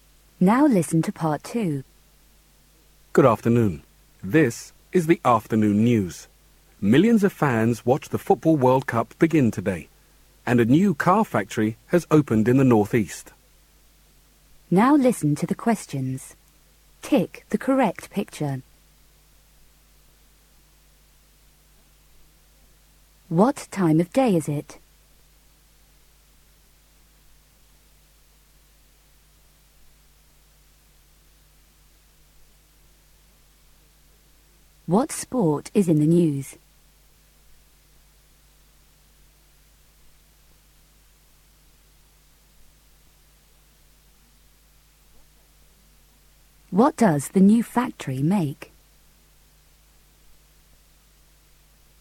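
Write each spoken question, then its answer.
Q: What time of day is it?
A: Afternoon

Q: What sport is in the news?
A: Football

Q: What does the new factory make?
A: Cars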